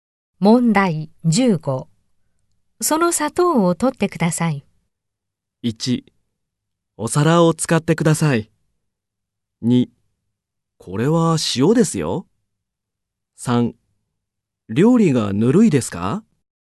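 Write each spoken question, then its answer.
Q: その砂糖を取ってください。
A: 2: これは塩ですよ。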